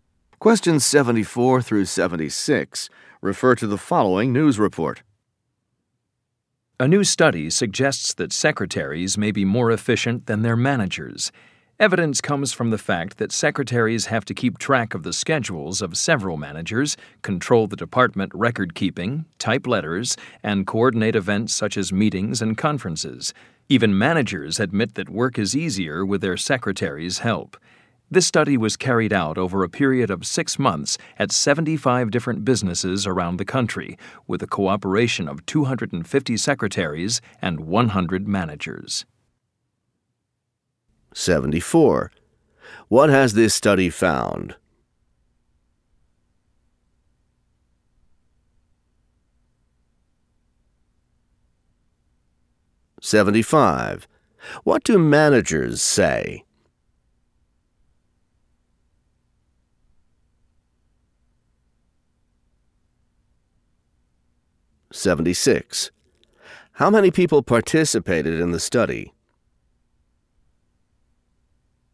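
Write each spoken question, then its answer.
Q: What has this study found?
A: Secretaries may be more efficient than their managers

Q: What do managers say?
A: Work is easier with their secretaries' help

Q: How many people participated in the study?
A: 350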